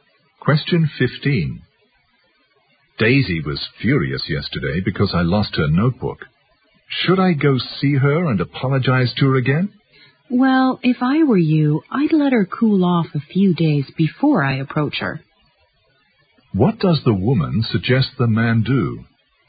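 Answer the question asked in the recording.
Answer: Wait a few days for Daisy to calm down before approaching her.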